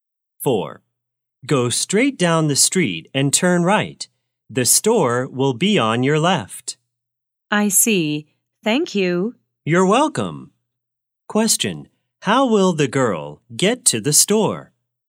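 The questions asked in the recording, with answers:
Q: Question, how will the girl get to the store?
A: Go straight down the street and turn right; the store is on the left.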